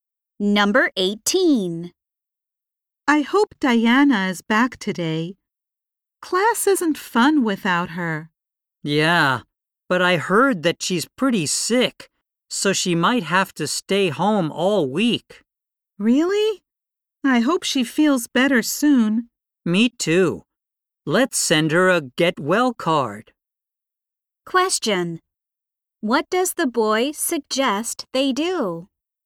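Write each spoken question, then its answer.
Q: What does the boy suggest they do?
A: Send Diana a get well card.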